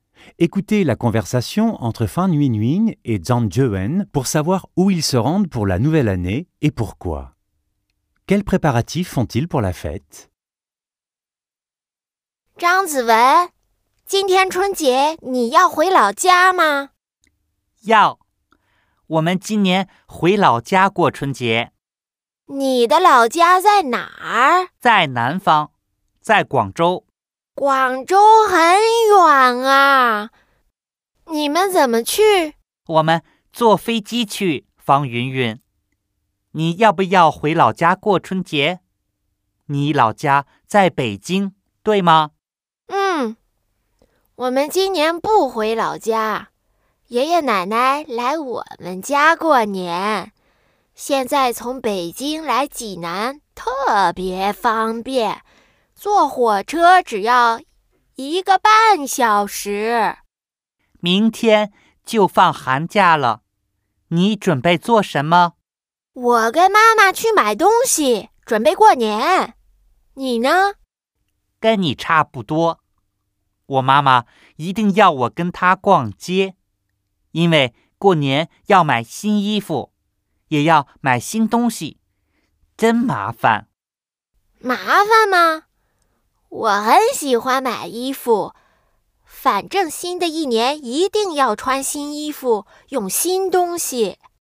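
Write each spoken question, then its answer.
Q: Écoutez la conversation entre Fan Yuanyuan et Zhang Jiewen pour savoir où ils se rendent pour la nouvelle année et pourquoi.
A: Zhang Jiewen rentre dans sa ville natale, Guangzhou (en avion), pour y passer la fête du Printemps ; Fan Yuanyuan ne rentre pas à Pékin et reste à la maison, car ses grands-parents viennent chez eux

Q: Quels préparatifs font-ils pour la fête?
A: Ils font des courses avec leur mère pour acheter des vêtements neufs et des choses neuves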